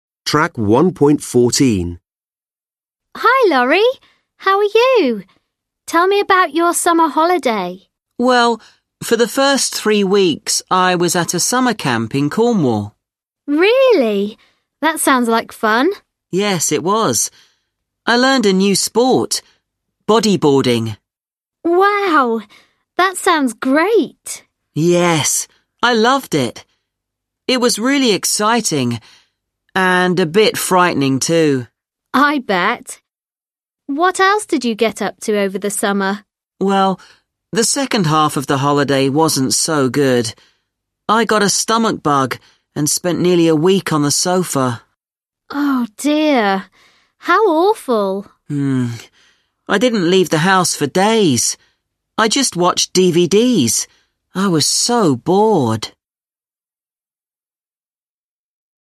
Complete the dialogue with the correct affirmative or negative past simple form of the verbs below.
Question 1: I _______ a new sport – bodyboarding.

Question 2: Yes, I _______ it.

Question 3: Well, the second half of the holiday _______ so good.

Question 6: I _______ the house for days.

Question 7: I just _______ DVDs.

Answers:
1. learned / learnt
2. loved
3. wasn't
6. didn't leave
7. watched

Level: Lớp 10